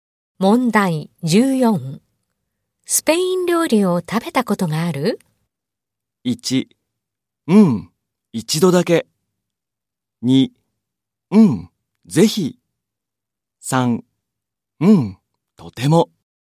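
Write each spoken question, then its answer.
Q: スペイン料理を食べたことがある?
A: 1: うん。一度だけ。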